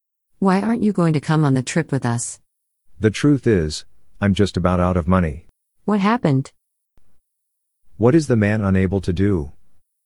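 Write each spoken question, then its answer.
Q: What is the man unable to do?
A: Go on the trip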